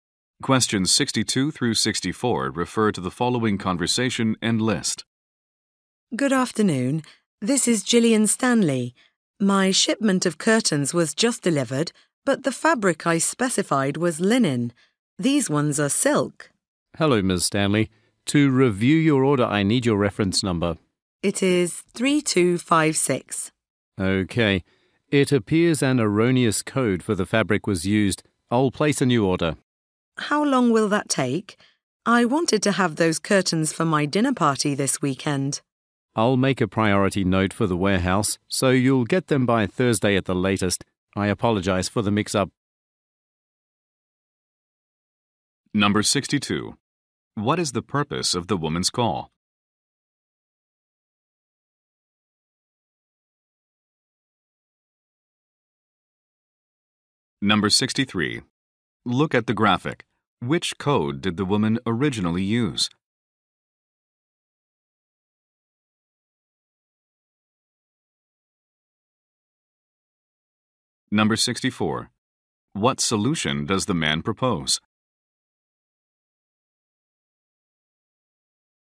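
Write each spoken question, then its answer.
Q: What is the purpose of the woman's call?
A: To report that she received the wrong fabric.

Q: What solution does the man propose?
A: Placing a new priority order.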